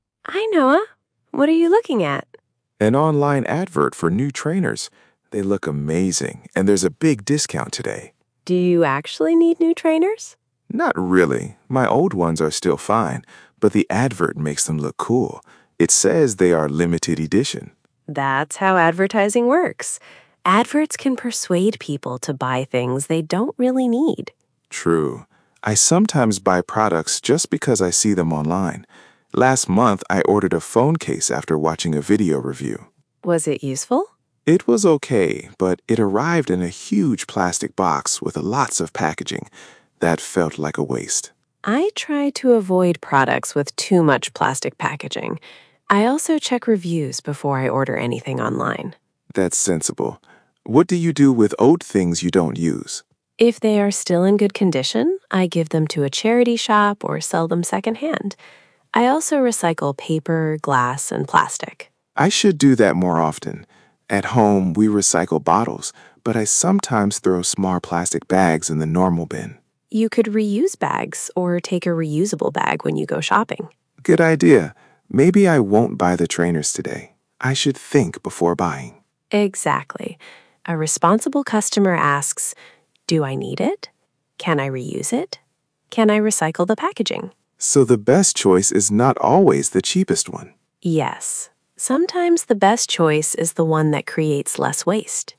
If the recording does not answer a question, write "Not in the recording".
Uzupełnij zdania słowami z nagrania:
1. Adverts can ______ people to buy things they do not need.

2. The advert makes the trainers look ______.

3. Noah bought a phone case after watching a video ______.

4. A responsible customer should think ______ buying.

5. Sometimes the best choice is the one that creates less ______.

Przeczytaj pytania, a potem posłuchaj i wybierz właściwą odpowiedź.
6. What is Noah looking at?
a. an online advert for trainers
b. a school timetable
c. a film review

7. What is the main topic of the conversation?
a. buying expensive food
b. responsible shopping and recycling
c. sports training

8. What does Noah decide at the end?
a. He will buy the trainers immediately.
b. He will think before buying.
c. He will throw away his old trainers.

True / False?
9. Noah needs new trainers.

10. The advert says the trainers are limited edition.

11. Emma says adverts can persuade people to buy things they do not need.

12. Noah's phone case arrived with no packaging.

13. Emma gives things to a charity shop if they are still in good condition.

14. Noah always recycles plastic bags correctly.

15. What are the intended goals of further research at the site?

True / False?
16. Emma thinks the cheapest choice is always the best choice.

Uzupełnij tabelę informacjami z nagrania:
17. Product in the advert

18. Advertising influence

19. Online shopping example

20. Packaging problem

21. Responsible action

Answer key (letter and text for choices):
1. persuade
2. cool
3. review
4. before
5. waste
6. a. an online advert for trainers
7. b. responsible shopping and recycling
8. b. He will think before buying.
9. False
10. True
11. True
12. False
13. True
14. False
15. Not in the recording
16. False
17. new trainers with a big discount
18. the advert makes the trainers look cool and limited edition
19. Noah ordered a phone case after watching a video review
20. the phone case arrived in a huge plastic box with lots of packaging
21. check reviews, avoid too much packaging, reuse bags, recycle, buy second-hand

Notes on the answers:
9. his old ones are still fine.
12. it arrived in a huge plastic box with lots of packaging.
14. he sometimes throws small plastic bags in the normal bin.
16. she says the best choice is the one that creates less waste.

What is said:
Emma: Hi, Noah. What are you looking at?
Noah: An online advert for new trainers. They look amazing, and there's a big discount today.
Emma: Do you actually need new trainers?
Noah: Not really. My old ones are still fine, but the advert makes them look cool. It says they are limited edition.
Emma: That's how advertising works. Adverts can persuade people to buy things they don't really need.
Noah: True. I sometimes buy products just because I see them online. Last month, I ordered a phone case after watching a video review.
Emma: Was it useful?
Noah: It was okay, but it arrived in a huge plastic box with lots of packaging. That felt like a waste.
Emma: I try to avoid products with too much plastic packaging. I also check reviews before I order anything online.
Noah: That's sensible. What do you do with old things you don't use?
Emma: If they are still in good condition, I give them to a charity shop or sell them second-hand. I also recycle paper, glass and plastic.
Noah: I should do that more often. At home, we recycle bottles, but I sometimes throw small plastic bags in the normal bin.
Emma: You could reuse bags or take a reusable bag when you go shopping.
Noah: Good idea. Maybe I won't buy the trainers today. I should think before buying.
Emma: Exactly. A responsible customer asks: Do I need it? Can I reuse it? Can I recycle the packaging?
Noah: So the best choice is not always the cheapest one.
Emma: Yes. Sometimes the best choice is the one that creates less waste.

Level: A2+/B1